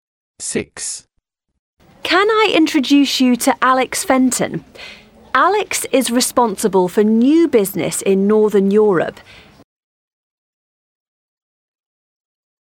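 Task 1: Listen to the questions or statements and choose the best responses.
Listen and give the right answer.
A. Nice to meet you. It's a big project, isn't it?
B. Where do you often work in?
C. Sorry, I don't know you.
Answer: A. Nice to meet you. It's a big project, isn't it?

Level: A2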